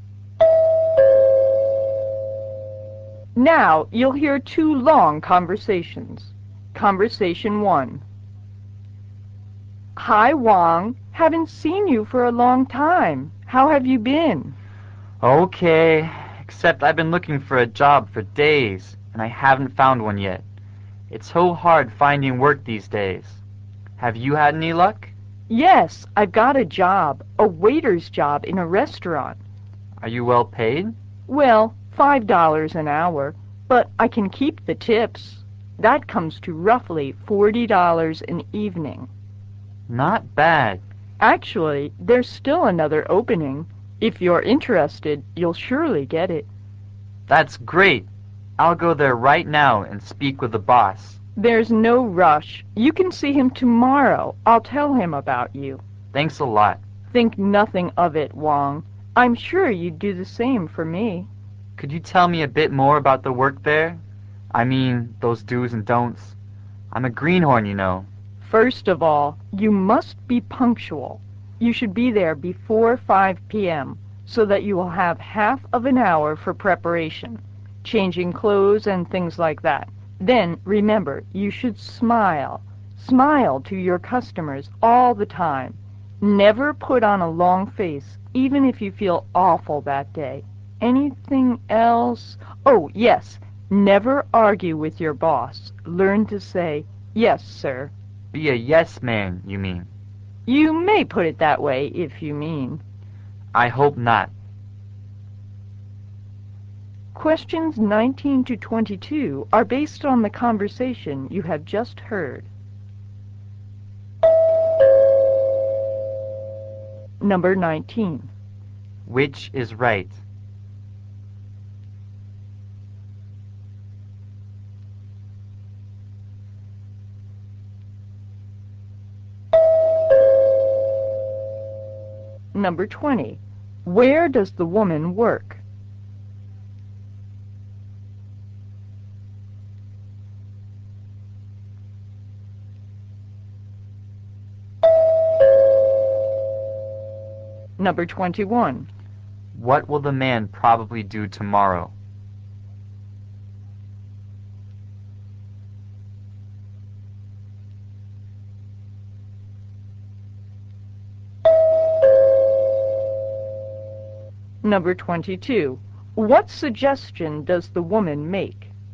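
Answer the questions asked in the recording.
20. In a restaurant
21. See the restaurant boss about the job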